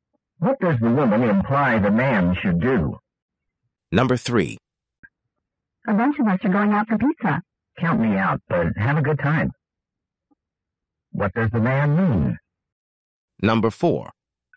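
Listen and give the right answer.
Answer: He won't go out for pizza.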